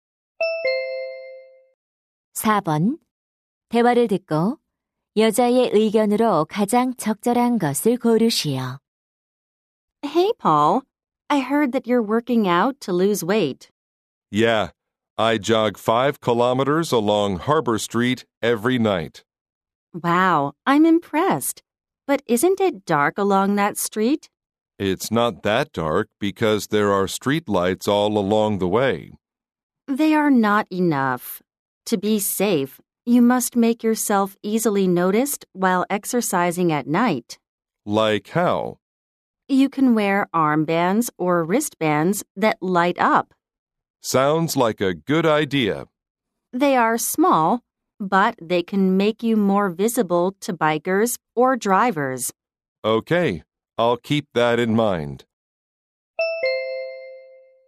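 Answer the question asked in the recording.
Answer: 밤에 운동할 때는 눈에 잘 띄도록 빛나는 밴드를 착용해야 한다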